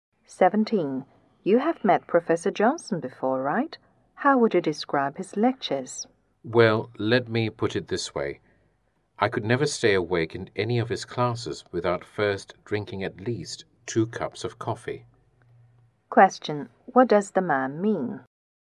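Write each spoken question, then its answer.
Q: What does the man mean?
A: Professor Johnson's lectures are boring.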